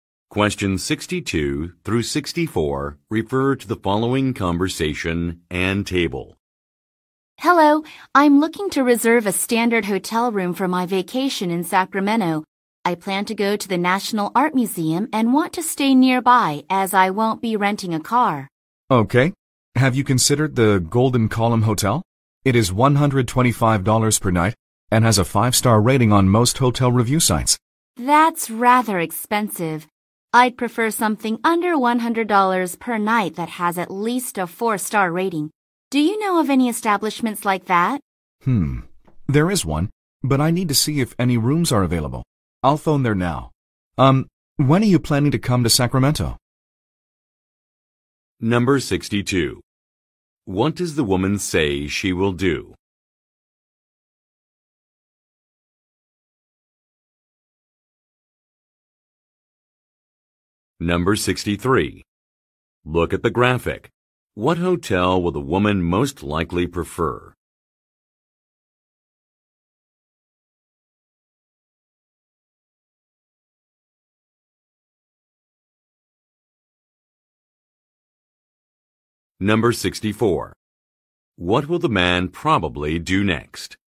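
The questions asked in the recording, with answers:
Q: What will the man probably do next?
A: Phone a hotel to check room availability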